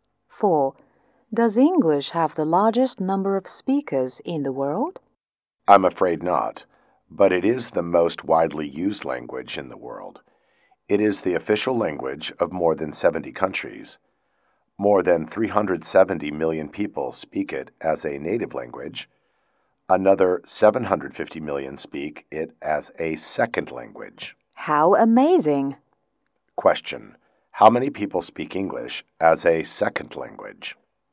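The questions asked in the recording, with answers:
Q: How many people speak English as a second language?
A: 750 million.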